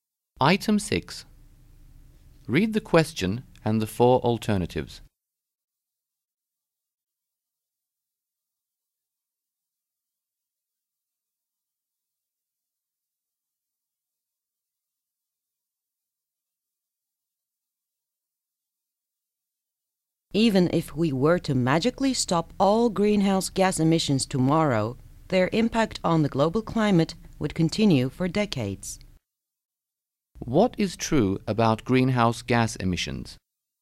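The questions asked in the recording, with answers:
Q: What is true about greenhouse gas emissions?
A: Their effect on the climate would continue for decades even if they stopped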